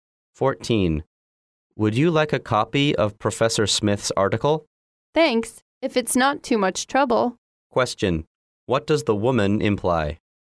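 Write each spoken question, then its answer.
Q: What does the woman imply?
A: She would like a copy of the article.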